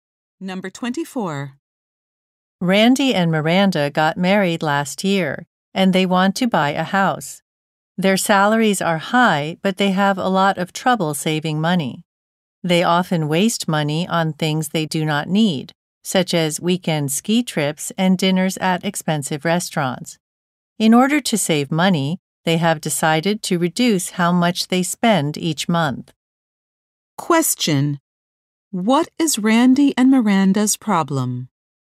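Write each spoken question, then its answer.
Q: Question: What is Randy and Miranda's problem?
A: They have trouble saving money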